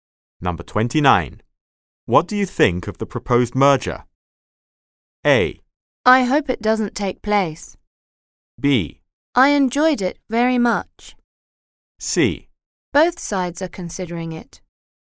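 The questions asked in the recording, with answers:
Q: What do you think of the proposed merger?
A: A: I hope it doesn't take place.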